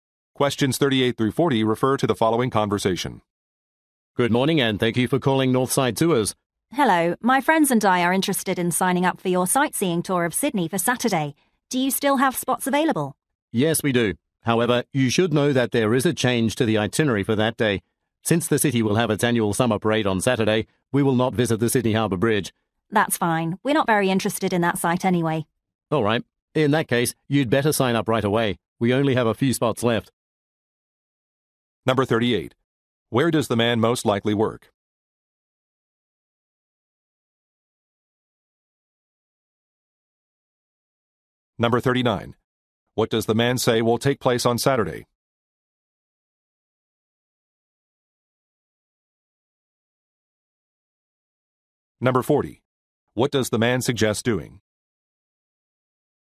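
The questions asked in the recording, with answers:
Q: What does the man suggest doing?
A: Signing up for the tour right away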